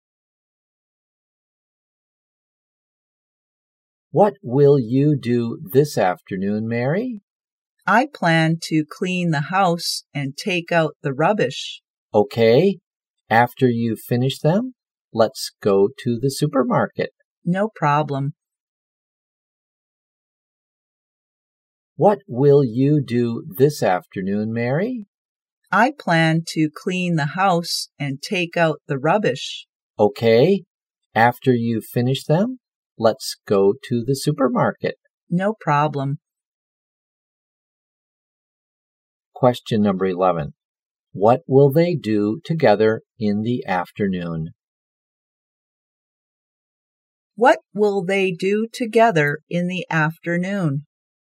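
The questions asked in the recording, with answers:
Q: What will they do together in the afternoon?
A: Go to the supermarket.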